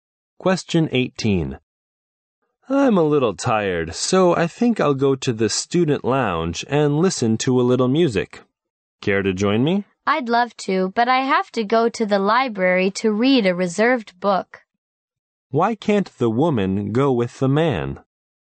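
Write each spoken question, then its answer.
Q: Why can't the woman go with the man?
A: She has to go to the library to read a reserved book.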